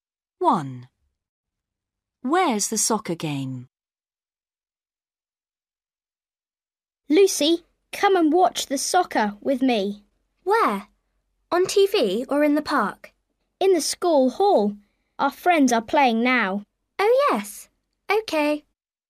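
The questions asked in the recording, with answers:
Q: Where's the soccer game?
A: In the school hall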